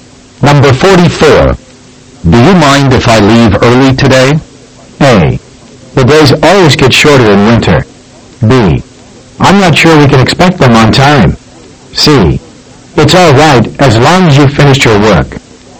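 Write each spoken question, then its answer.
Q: Do you mind if I leave early today?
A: C: It's all right as long as you've finished your work.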